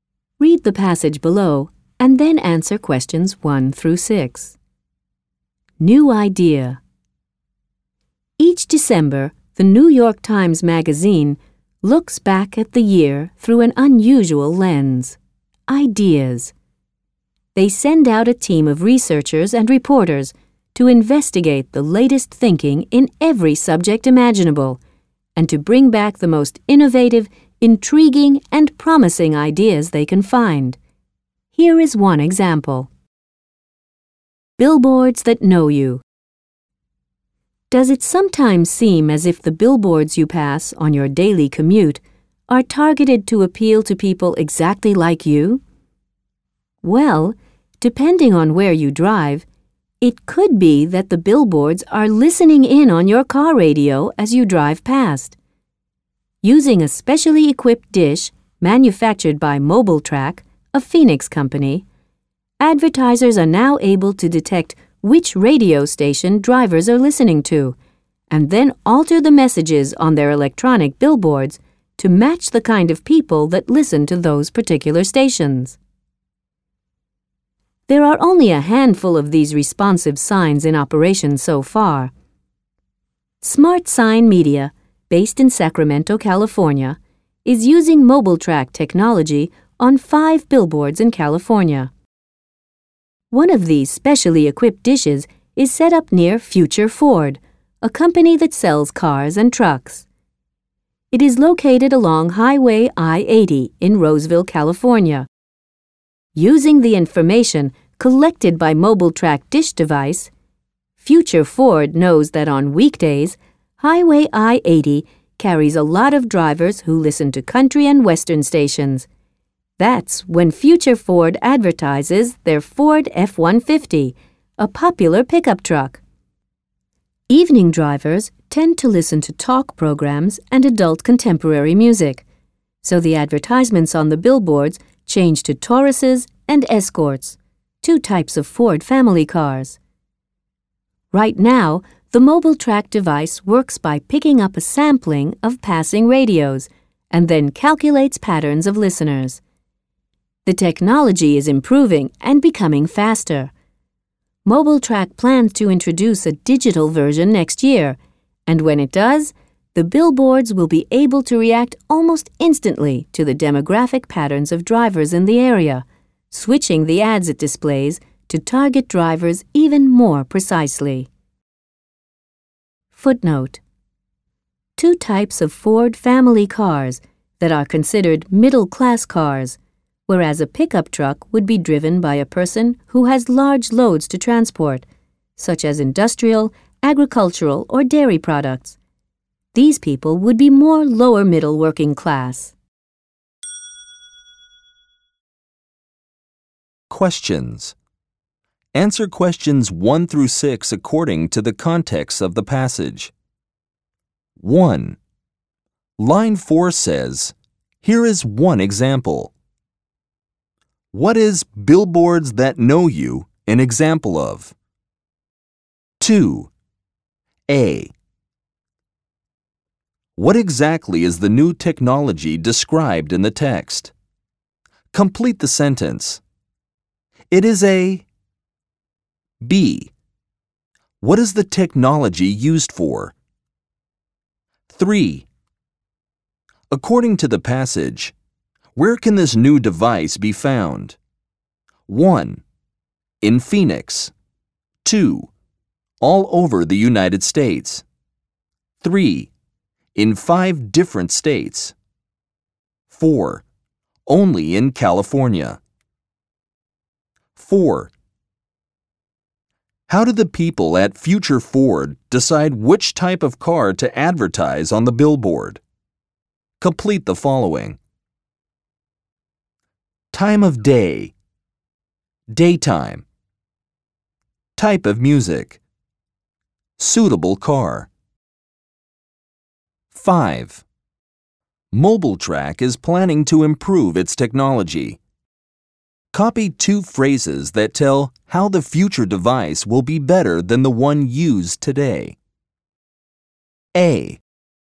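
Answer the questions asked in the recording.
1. An innovative idea found by the New York Times Magazine's researchers
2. A specially equipped dish that detects which radio station passing drivers are listening to
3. To change the messages on electronic billboards to match the kind of people listening to those stations
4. 4: Only in California.
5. react almost instantly; target drivers even more precisely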